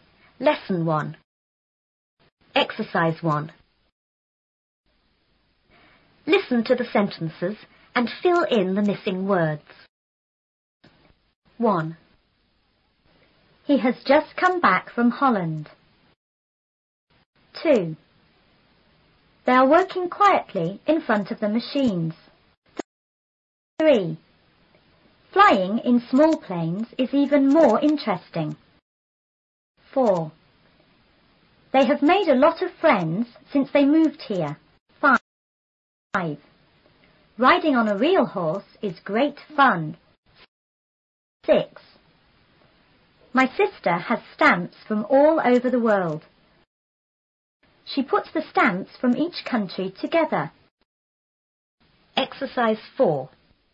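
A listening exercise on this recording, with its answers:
1.Listen to the sentences and fill in the missing words.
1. He has___come back from___.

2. They are working___in front of the___.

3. Flying in small planes is___more___.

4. They have___a lot of friends since they___here.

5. Riding on a___horse is great___.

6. She___the stamps from each country___.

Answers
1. just; Holland
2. quietly; machines
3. even; interesting
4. made; moved
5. real; fun
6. puts; together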